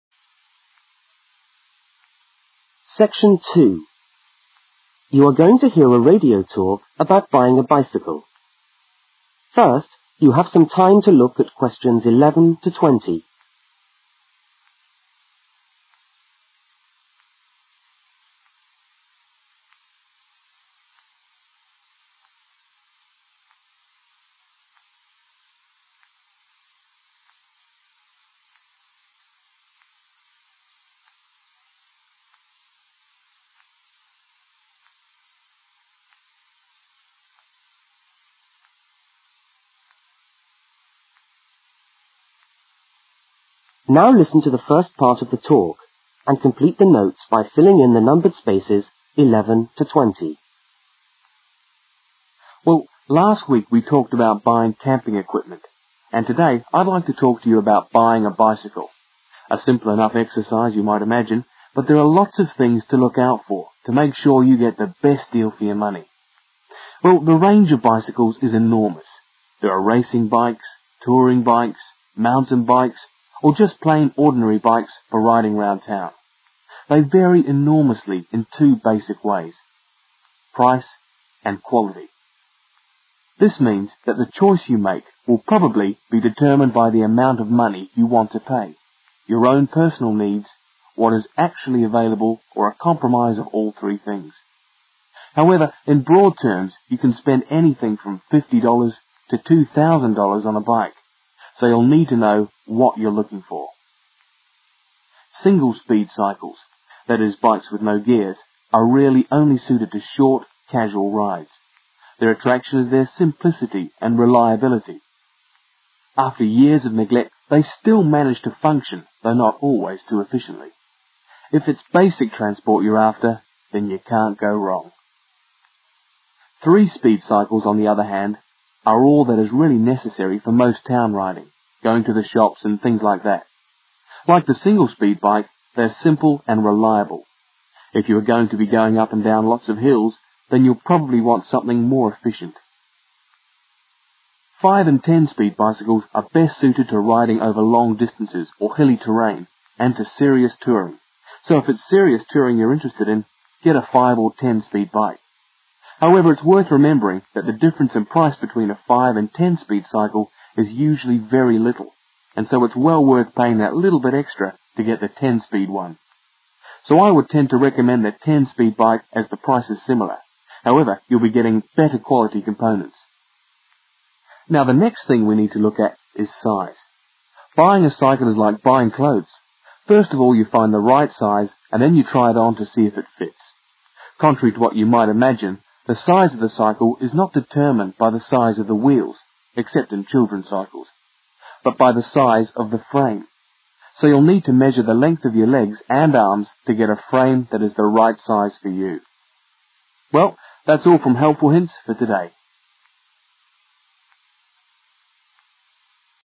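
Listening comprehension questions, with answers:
Complete the notes below. Use NO MORE THAN THREE WORDS for each answer.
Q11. (11) ..............................................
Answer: mountain

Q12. They vary in price and (12) .................................................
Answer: quality

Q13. Prices range from $50.00 to (13) ..........................................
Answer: $2,000

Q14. Single speed cycles are suitable for (14) .................................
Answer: short, casual rides

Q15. Three speed cycles are suitable for (15) ..................................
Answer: town riding

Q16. Five and ten speed cycles are suitable for longer distances, hills and (16) ..............................................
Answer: serious touring

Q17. Ten speed bikes are better because they are (17) ............................ in price but (18) .......................................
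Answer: similar

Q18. Ten speed bikes are better because they are (17) ............................ in price but (18) .......................................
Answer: better quality components

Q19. Buying a cycle is like (19) ..................................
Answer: buying clothes

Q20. The size of the bicycle is determined by the size of the (20) ..............................................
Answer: frame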